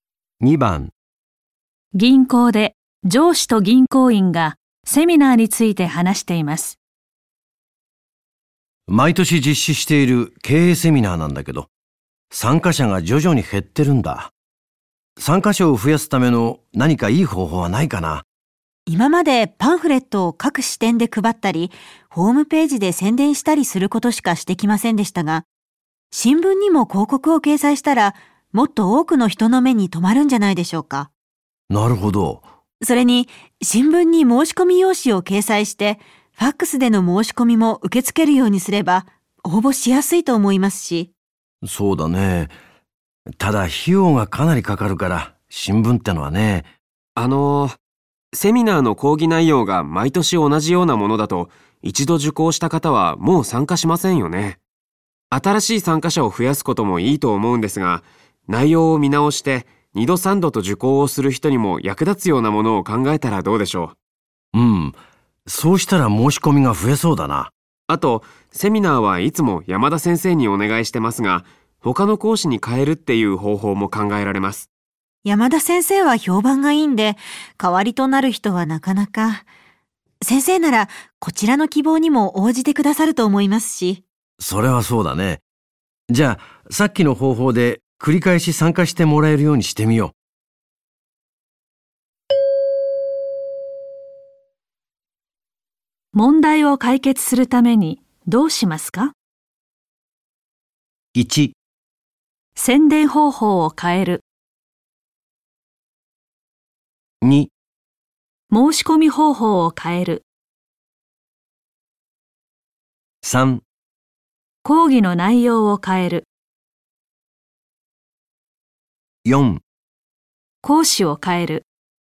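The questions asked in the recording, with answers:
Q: 問題を解決するためにどうしますか?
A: 3: 講義の内容を変える。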